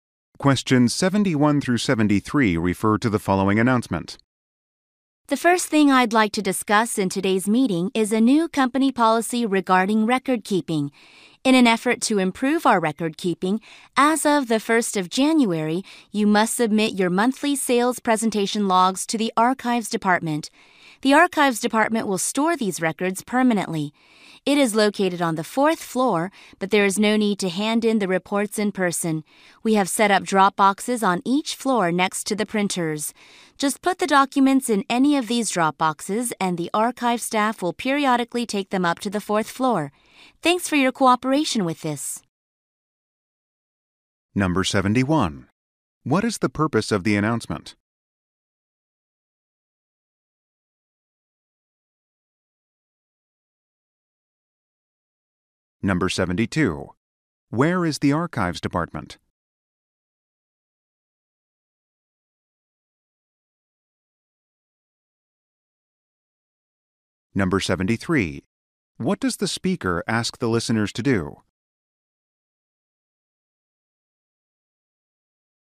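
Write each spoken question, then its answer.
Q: What is the purpose of the announcement?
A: To explain a new record-keeping policy

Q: Where is the Archives Department?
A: On the fourth floor

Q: What does the speaker ask the listeners to do?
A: Put their monthly sales presentation logs in the drop boxes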